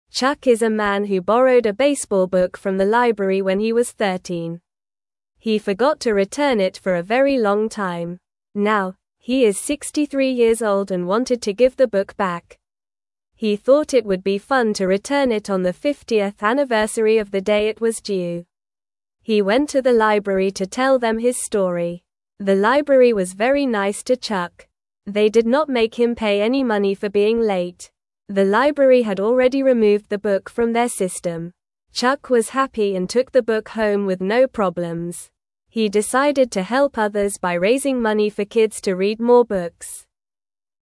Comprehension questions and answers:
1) Chuck is a man who borrowed a (1)______ book from the (2)______ when he was 13.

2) Chuck is a man who borrowed a (1)______ book from the (2)______ when he was 13.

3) Now, he is 63 years old and wanted to (3)______ the (4)______ back.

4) Now, he is 63 years old and wanted to (3)______ the (4)______ back.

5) They did not (5)______ him pay any (6)______ for being late.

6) They did not (5)______ him pay any (6)______ for being late.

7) Chuck was happy and took the book home with no (7)______.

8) He decided to (8)______ others by raising money for kids to read more books.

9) How old is Chuck now?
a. 50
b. 63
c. 40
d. 30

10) What did Chuck borrow from the library?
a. A toy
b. A baseball book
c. A movie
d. A game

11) How long did Chuck keep the book?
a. 5 years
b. 10 years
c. 1 year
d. 50 years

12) What did Chuck want to do with the book?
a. Give it back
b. Throw it away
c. Sell it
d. Keep it forever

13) What did the library say to Chuck?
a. You must pay a lot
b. You are bad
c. No money needed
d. You can't come back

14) What did Chuck want to help?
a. Animals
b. Old people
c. The library workers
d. Kids read more books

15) What did Chuck do after he returned the book?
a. Lost it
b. Gave it to a friend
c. Took it home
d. Burned it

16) When did Chuck return the book?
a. 50 years late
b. 1 year late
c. 10 years late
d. 5 years late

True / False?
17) Chuck borrowed a basketball book from the library when he was 13 years old.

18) The library did not make Chuck pay for being late.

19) The library had already taken the book out of their system.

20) Chuck remembered to return the book promptly.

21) Chuck wants to discourage kids from reading books.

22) Chuck is now 53 years old.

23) The library was nice to Chuck when he returned the book.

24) Chuck wanted to return the book on the 50th anniversary of when it was due.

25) How old was Chuck when he borrowed the book?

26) How many years did Chuck wait to return the book?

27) What did Chuck want to do on the 50th anniversary?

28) How did the library feel about Chuck returning the book?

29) Did Chuck have to pay money for the late book?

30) What did Chuck decide to do to help kids?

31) What kind of book did Chuck borrow from the library?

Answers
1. baseball
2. library
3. give
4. book
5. make
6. money
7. problems
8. help
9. b. 63
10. b. A baseball book
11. d. 50 years
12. a. Give it back
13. c. No money needed
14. d. Kids read more books
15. c. Took it home
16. a. 50 years late
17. False
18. True
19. True
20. False
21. False
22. False
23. True
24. True
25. Chuck was 13 years old.
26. Chuck waited 50 years to return the book.
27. Chuck wanted to return the book on the 50th anniversary.
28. The library was very nice to Chuck.
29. No, Chuck did not have to pay any money.
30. Chuck decided to raise money for kids to read more books.
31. Chuck borrowed a baseball book from the library.

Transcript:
Chuck is a man who borrowed a baseball book from the library when he was 13. He forgot to return it for a very long time. Now, he is 63 years old and wanted to give the book back. He thought it would be fun to return it on the 50th anniversary of the day it was due. He went to the library to tell them his story.
The library was very nice to Chuck. They did not make him pay any money for being late. The library had already removed the book from their system. Chuck was happy and took the book home with no problems. He decided to help others by raising money for kids to read more books.

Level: Level 1

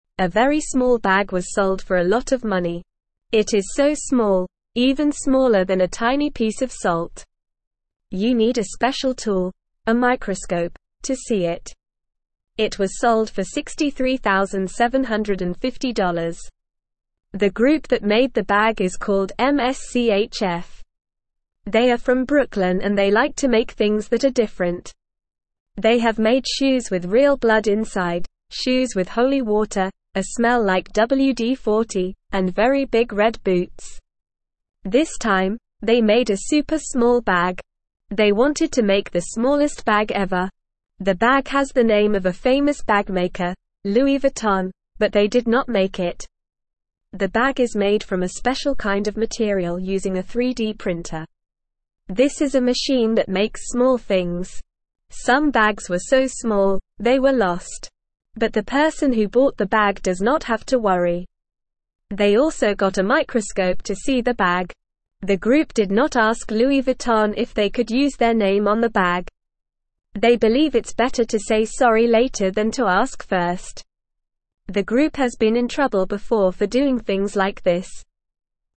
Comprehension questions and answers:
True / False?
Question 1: The small bag was sold for $63,750.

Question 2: The group that made the bag is called MSCHF and they are from New York.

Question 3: The bag is bigger than a piece of salt.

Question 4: The bag was made by a famous bag maker, Louis Vuitton.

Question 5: The bag is made from a special material using a machine called a 3D printer.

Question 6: The person who bought the bag also got a big telescope to see it.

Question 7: The group asked Louis Vuitton if they could use their name on the bag.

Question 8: How big is the bag that was sold?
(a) As big as a house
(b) Smaller than a piece of salt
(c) As big as a car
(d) As big as a shoe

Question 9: How much was the bag sold for?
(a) $63,750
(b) $6,375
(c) $637,500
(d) $63.75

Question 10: Where is the group that made the bag from?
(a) London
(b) Paris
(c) Tokyo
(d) Brooklyn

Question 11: What did the group also make before?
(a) A giant teddy bear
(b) A rainbow umbrella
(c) Shoes with real blood inside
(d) A golden necklace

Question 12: What is the name on the bag?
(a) MSCHF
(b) Gucci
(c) Prada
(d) Louis Vuitton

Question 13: Who actually made the bag?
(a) Louis Vuitton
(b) Gucci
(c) Prada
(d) MSCHF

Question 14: How was the bag made?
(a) By hand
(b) With a sewing machine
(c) Using a 3D printer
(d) With a knitting needle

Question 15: What did the person who bought the bag also get?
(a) A pair of shoes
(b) A necklace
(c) A teddy bear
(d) A microscope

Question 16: It is so small, even smaller than a tiny piece of (1)______.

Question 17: You need a special tool, a (2)______, to see it.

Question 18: The group that made the bag is called (3)______.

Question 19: The bag has the name of a famous bag maker, (4)______, but they did not make it.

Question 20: Some bags were so small, they were (5)______.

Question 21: How big is the very small bag that was sold?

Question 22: What tool do you need to see the small bag?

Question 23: How much money was the small bag sold for?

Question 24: Who made the small bag?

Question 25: What is the name on the small bag?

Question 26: What was the small bag made from?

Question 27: What else did the person who bought the bag get?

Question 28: Has the group that made the bag been in trouble before?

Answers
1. True
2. True
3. False
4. False
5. True
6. False
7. False
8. (b) Smaller than a piece of salt
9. (a) $63,750
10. (d) Brooklyn
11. (c) Shoes with real blood inside
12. (d) Louis Vuitton
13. (d) MSCHF
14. (c) Using a 3D printer
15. (d) A microscope
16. salt
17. microscope
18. MSCHF
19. Louis Vuitton
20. lost
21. The bag is smaller than a tiny piece of salt.
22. You need a microscope to see the bag.
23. The bag was sold for $63,750.
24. The group called MSCHF made the bag.
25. The name on the bag is Louis Vuitton.
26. The bag is made from a special kind of material using a 3D printer.
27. The person also got a microscope to see the bag.
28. Yes, the group has been in trouble before for doing things like this.

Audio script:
A very small bag was sold for a lot of money. It is so small, even smaller than a tiny piece of salt. You need a special tool, a microscope, to see it. It was sold for $63,750. The group that made the bag is called MSCHF. They are from Brooklyn and they like to make things that are different. They have made shoes with real blood inside, shoes with holy water, a smell like WD-40, and very big red boots.
This time, they made a super small bag. They wanted to make the smallest bag ever. The bag has the name of a famous bag maker, Louis Vuitton, but they did not make it. The bag is made from a special kind of material using a 3D printer. This is a machine that makes small things. Some bags were so small, they were lost. But the person who bought the bag does not have to worry. They also got a microscope to see the bag. The group did not ask Louis Vuitton if they could use their name on the bag. They believe it's better to say sorry later than to ask first. The group has been in trouble before for doing things like this.

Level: Level 1

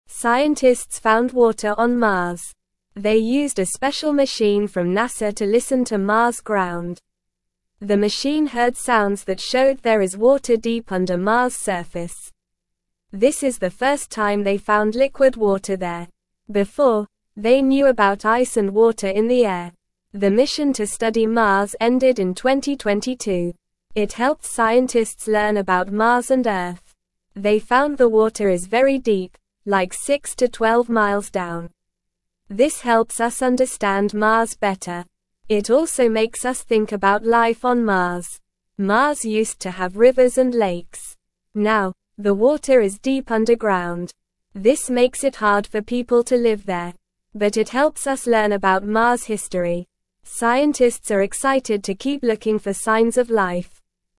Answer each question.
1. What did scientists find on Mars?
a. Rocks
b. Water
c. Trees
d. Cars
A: b. Water

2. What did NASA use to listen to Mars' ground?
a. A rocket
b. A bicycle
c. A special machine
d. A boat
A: c. A special machine

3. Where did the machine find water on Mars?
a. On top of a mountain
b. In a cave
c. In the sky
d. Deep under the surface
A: d. Deep under the surface

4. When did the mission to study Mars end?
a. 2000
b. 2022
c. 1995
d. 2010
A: b. 2022

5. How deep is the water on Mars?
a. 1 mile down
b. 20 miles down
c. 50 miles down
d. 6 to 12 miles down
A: d. 6 to 12 miles down

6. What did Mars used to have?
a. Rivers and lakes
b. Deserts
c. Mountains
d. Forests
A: a. Rivers and lakes

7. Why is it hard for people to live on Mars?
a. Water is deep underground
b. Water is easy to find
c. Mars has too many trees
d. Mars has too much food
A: a. Water is deep underground

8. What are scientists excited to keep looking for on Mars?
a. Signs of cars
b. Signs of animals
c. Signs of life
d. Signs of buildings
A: c. Signs of life

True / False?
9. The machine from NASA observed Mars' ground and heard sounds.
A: False

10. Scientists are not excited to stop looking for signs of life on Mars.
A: False

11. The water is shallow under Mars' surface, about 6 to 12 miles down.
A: False

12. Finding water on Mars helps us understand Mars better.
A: True

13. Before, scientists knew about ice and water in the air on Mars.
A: True

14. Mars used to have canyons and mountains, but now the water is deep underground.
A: False

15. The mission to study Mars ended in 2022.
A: True

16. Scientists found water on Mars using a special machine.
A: True

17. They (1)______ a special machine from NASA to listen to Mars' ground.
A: used

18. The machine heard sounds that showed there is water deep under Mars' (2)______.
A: surface

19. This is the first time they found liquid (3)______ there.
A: water

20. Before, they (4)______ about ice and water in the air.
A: knew

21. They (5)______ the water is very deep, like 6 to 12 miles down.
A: found

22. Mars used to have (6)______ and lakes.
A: rivers

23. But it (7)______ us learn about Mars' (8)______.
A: helps

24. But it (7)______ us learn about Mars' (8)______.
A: history

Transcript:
Scientists found water on Mars! They used a special machine from NASA to listen to Mars' ground. The machine heard sounds that showed there is water deep under Mars' surface. This is the first time they found liquid water there. Before, they knew about ice and water in the air.
It helped scientists learn about Mars and Earth. They found the water is very deep, like 6 to 12 miles down. This helps us understand Mars better. It also makes us think about life on Mars.
Mars used to have rivers and lakes. Now, the water is deep underground. This makes it hard for people to live there. But it helps us learn about Mars' history. Scientists are excited to keep looking for signs of life.

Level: Level 1

